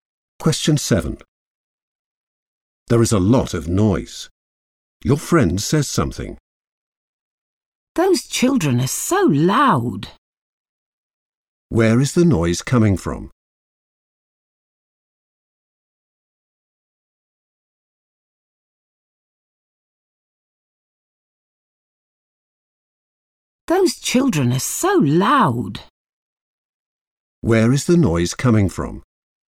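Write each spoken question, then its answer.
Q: Where is the noise coming from?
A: the children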